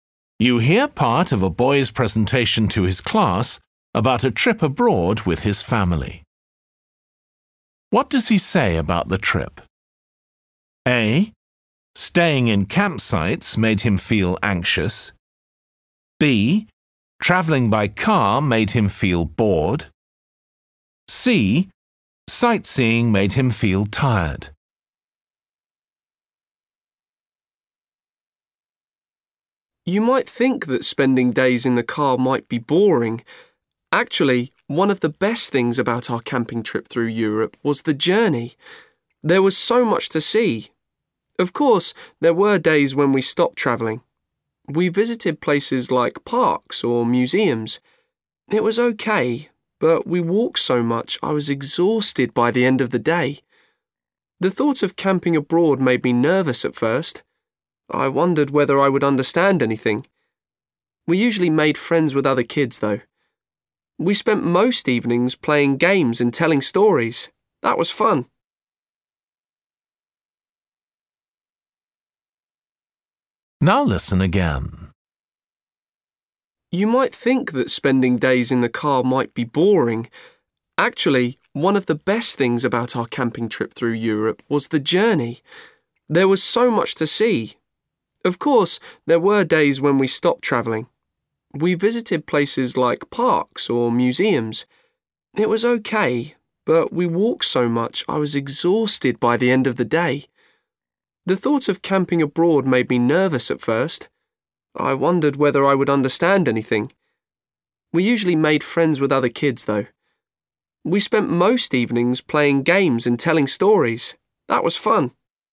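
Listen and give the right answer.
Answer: C: Sightseeing made him feel tired.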